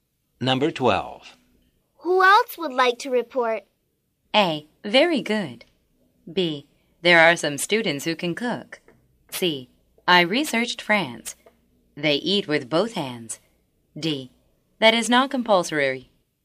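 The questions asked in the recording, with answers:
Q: Who else would like to report?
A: C: I researched France. They eat with both hands.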